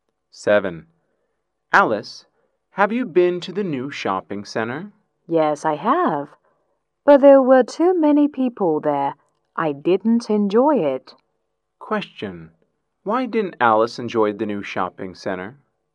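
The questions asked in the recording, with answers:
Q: Why didn't Alice enjoy the new shopping center?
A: There were too many people there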